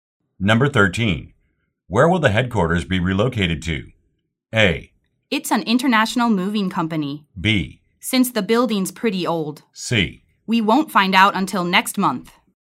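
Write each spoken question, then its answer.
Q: Where will the headquarters be relocated to?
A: C: We won't find out until next month.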